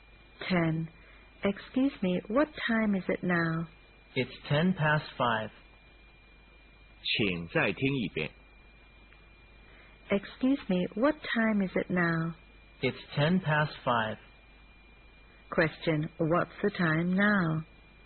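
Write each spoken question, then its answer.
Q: Question, what's the time now?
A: 5:10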